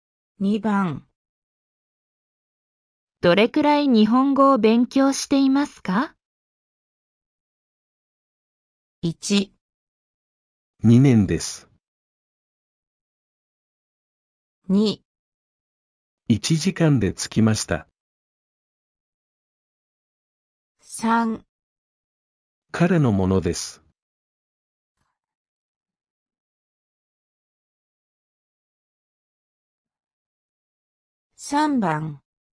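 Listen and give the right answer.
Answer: 1

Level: N5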